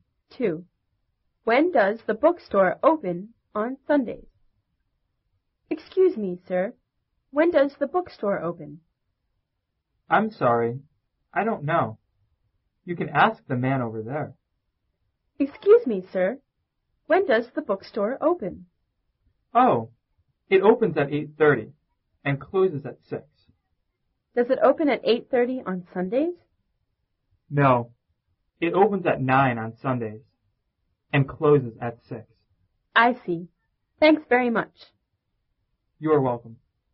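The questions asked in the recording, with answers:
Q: When does the bookstore open on Sundays?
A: At 9 o'clock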